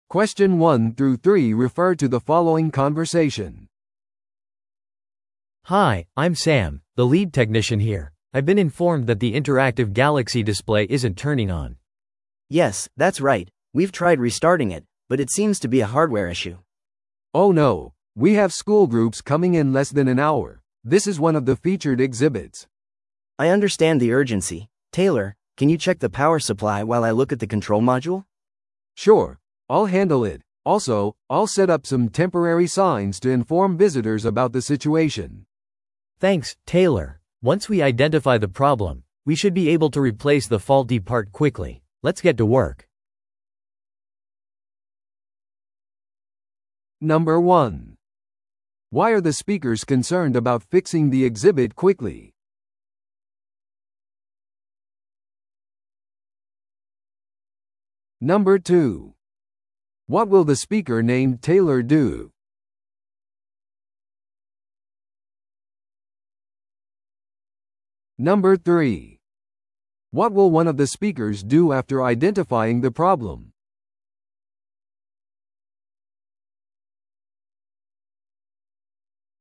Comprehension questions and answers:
Listen to the audio below and answer the questions.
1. Why are the speakers concerned about fixing the exhibit quickly?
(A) VIPが博物館を訪れる予定だから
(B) 学校のグループが間もなく到着するから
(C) 修理のために博物館を閉鎖する必要があるから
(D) その展示物がニュースレポートで特集されるから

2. What will the speaker named Taylor do?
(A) インタラクティブディスプレイを再起動する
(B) 電源を調査する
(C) 学校の団体を案内する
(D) 故障した部品を交換する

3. What will one of the speakers do after identifying the problem?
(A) 博物館の管理部門に知らせる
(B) 代わりの展示物を設置する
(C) 故障した部品を交換する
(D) さらに技術者を呼ぶ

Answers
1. (B) 学校のグループが間もなく到着するから
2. (B) 電源を調査する
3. (C) 故障した部品を交換する

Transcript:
A: Hi, I'm Sam, the lead technician here. I've been informed that the interactive galaxy display isn't turning on.
B: Yes, that's right. We've tried restarting it, but it seems to be a hardware issue.
C: Oh no, we have school groups coming in less than an hour. This is one of the featured exhibits.
B: I understand the urgency. Taylor, can you check the power supply while I look at the control module?
C: Sure, I'll handle it. Also, I'll set up some temporary signs to inform visitors about the situation.
A: Thanks, Taylor. Once we identify the problem, we should be able to replace the faulty part quickly. Let's get to work.

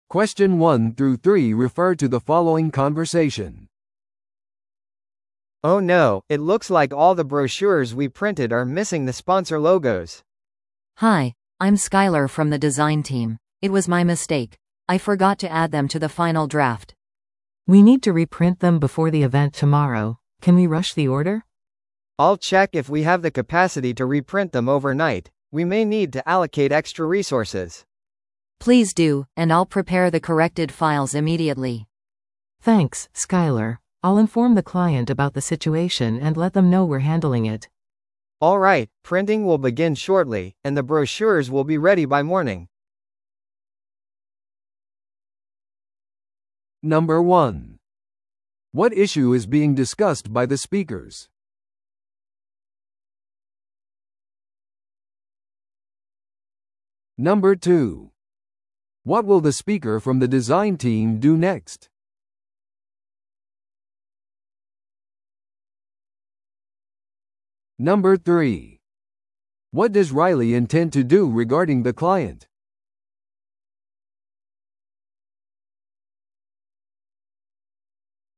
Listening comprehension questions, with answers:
Listen to the audio below and answer the questions.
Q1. What issue is being discussed by the speakers?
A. イベントの場所が変更されました。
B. パンフレットが時間通りに届けられなかった。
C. 印刷店でのプリンターの故障。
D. パンフレットからスポンサーロゴが抜けている。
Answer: D. パンフレットからスポンサーロゴが抜けている。

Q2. What will the speaker from the design team do next?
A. ミスを説明するためにイベントに参加する。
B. 修正されたパンフレットのファイルを準備する。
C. 将来のイベント用に新しいロゴを注文する。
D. 同様の問題を避けるためにスタッフを訓練する。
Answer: B. 修正されたパンフレットのファイルを準備する。

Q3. What does Riley intend to do regarding the client?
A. 印刷ミスに対して謝罪する。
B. 将来的なサービスの割引を提供する。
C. 再印刷プロセスについて更新する。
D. 締め切りを延長してもらうようにお願いする。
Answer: C. 再印刷プロセスについて更新する。

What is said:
A: Oh no, it looks like all the brochures we printed are missing the sponsor logos.
B: Hi, I'm Skyler from the design team. It was my mistake; I forgot to add them to the final draft.
C: We need to reprint them before the event tomorrow. Can we rush the order?
A: I'll check if we have the capacity to reprint them overnight. We may need to allocate extra resources.
B: Please do, and I'll prepare the corrected files immediately.
I'll inform the client about the situation and let them know we're handling it.
A: Alright, printing will begin shortly, and the brochures will be ready by morning.

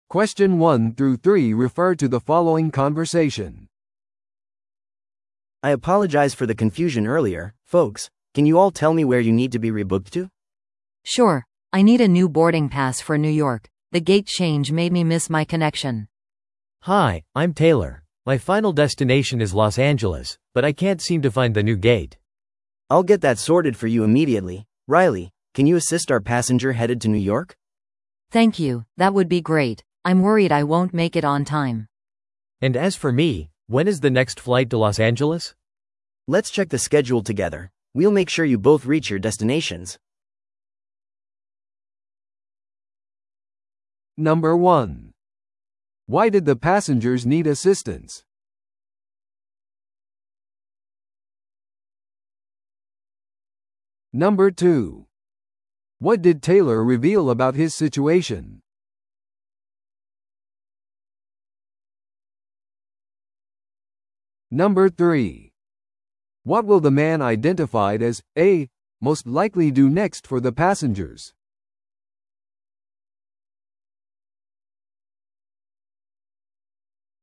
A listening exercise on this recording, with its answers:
Listen to the audio below and answer the questions.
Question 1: Why did the passengers need assistance?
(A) 荷物が紛失したため。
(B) 天候による遅延があったため。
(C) 特別なサービスが必要だったため。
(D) ゲート変更で乗り継ぎ便に乗り遅れたため。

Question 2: What did Taylor reveal about his situation?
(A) 空港のラウンジを探している。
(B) 旅行書類を紛失した。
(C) 自分のフライトの新しいゲートが見つからない。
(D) 最終目的地を変更したい。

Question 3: What will the man identified as 'A' most likely do next for the passengers?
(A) ターミナルへの案内を提供する。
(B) フライトを再予約し、スケジュールを確認する。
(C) 他の空港への交通手段を手配する。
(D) 将来の旅行のためのバウチャーを提供する。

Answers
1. (D) ゲート変更で乗り継ぎ便に乗り遅れたため。
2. (C) 自分のフライトの新しいゲートが見つからない。
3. (B) フライトを再予約し、スケジュールを確認する。

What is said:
A: I apologize for the confusion earlier, folks. Can you all tell me where you need to be rebooked to?
B: Sure, I need a new boarding pass for New York. The gate change made me miss my connection.
C: Hi, I'm Taylor. My final destination is Los Angeles, but I can't seem to find the new gate.
A: I'll get that sorted for you immediately. Riley, can you assist our passenger headed to New York?
B: Thank you, that would be great. I'm worried I won't make it on time.
C: And as for me, when is the next flight to Los Angeles?
A: Let's check the schedule together. We'll make sure you both reach your destinations.

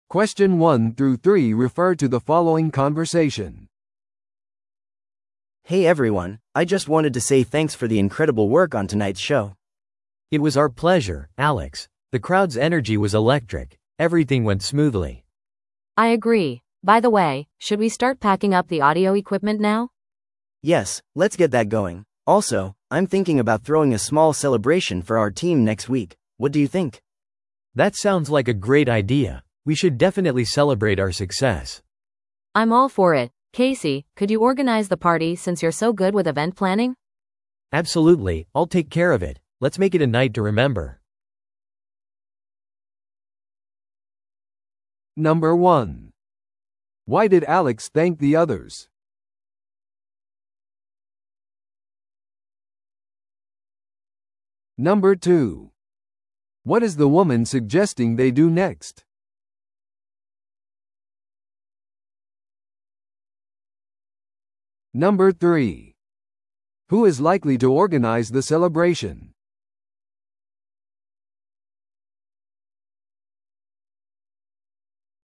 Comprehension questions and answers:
Listen to the audio below and answer the questions.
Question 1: Why did Alex thank the others?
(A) 素晴らしい音楽演奏のため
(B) 成功したショー設置のため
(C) ショーに参加したため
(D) 彼のソロ活動を支持してくれたため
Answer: (B) 成功したショー設置のため

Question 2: What is the woman suggesting they do next?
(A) 新しいショーを企画する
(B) 機材を片付ける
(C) お祝いに出かける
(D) 次のリハーサルを計画する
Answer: (B) 機材を片付ける

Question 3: Who is likely to organize the celebration?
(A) アレックス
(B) 会話中の女性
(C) ケーシー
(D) ミュージシャンたち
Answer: (C) ケーシー

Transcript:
A: Hey everyone, I just wanted to say thanks for the incredible work on tonight's show!
B: It was our pleasure, Alex. The crowd's energy was electric. Everything went smoothly.
C: I agree. By the way, should we start packing up the audio equipment now?
A: Yes, let's get that going. Also, I'm thinking about throwing a small celebration for our team next week. What do you think?
B: That sounds like a great idea! We should definitely celebrate our success.
C: I'm all for it. Casey, could you organize the party since you're so good with event planning?
B: Absolutely, I'll take care of it. Let's make it a night to remember!

